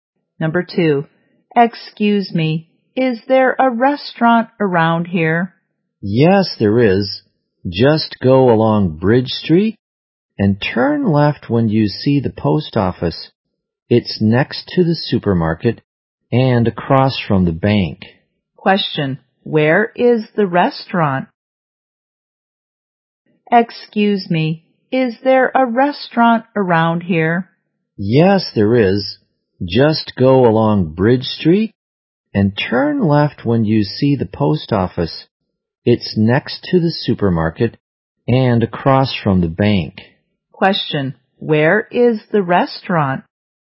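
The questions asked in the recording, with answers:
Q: where is the restaurant?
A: Next to the supermarket and across from the bank.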